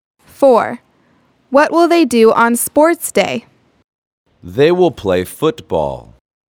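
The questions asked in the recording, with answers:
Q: What will they do on Sports Day?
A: Play football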